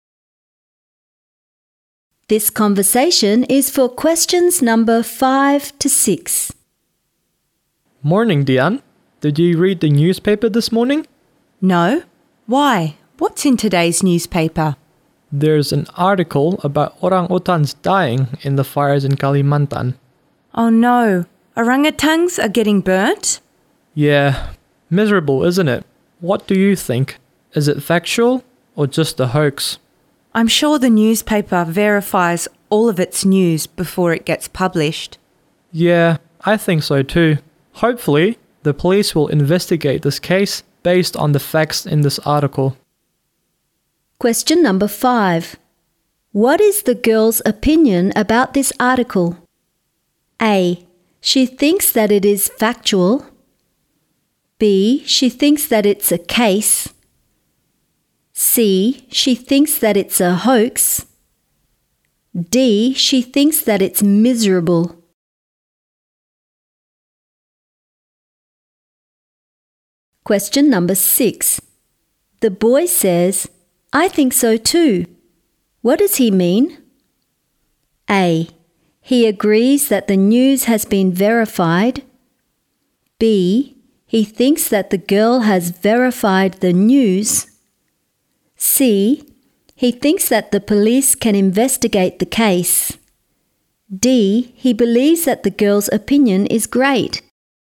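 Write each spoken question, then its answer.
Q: What is the girl's opinion about this article?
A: A: She thinks that it is factual.

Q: The boy says, I think so too.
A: A: He agrees that the news has been verified.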